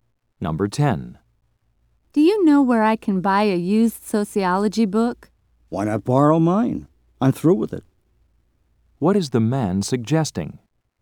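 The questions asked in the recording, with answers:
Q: What is the man suggesting?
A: That the woman borrow his book.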